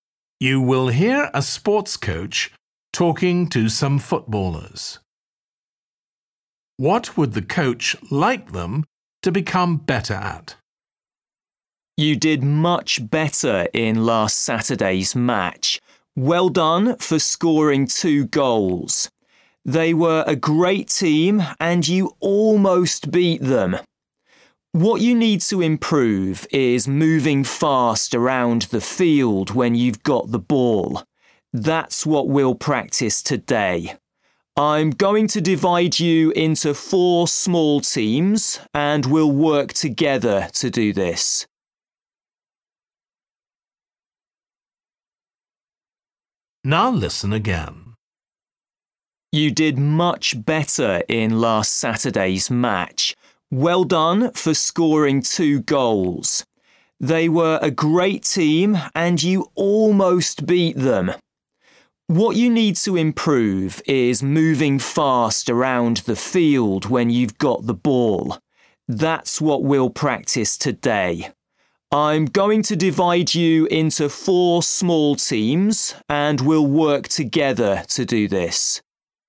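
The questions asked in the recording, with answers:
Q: What would the coach like them to become better at?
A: Moving fast around the field with the ball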